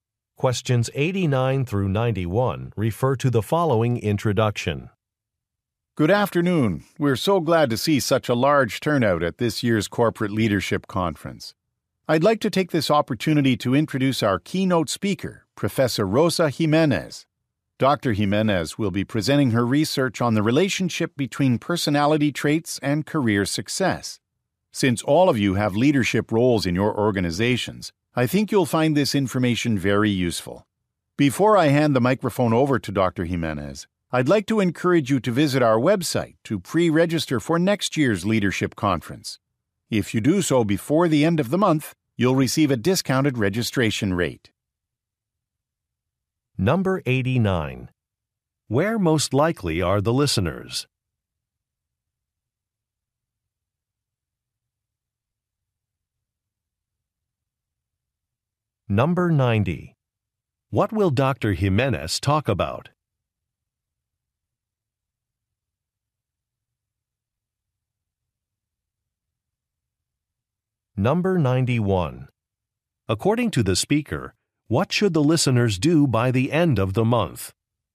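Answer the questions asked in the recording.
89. At a conference
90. Personality traits and career success
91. Pre-register for next year's conference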